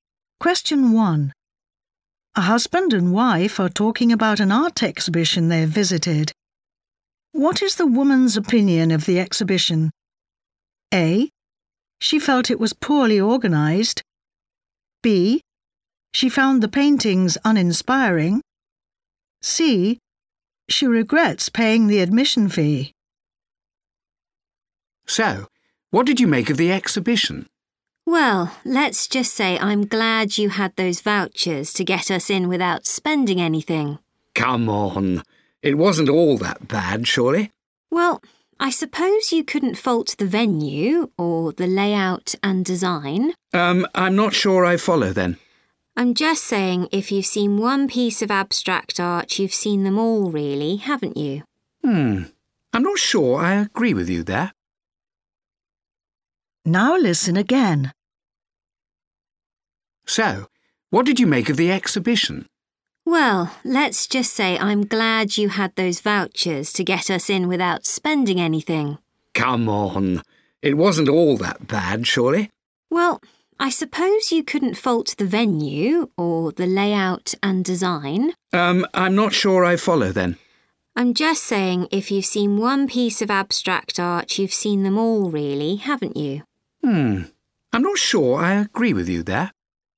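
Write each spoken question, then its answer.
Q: What is the woman's opinion of the exhibition?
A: B: She found the paintings uninspiring.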